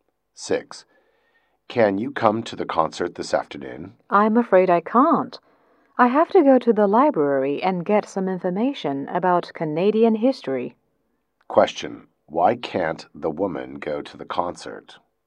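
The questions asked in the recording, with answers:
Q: Why can't the woman go to the concert?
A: She has to go to the library to get information about Canadian history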